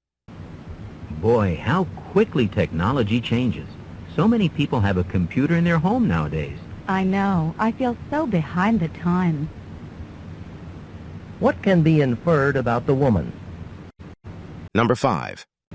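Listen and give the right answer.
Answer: She doesn't have a computer at home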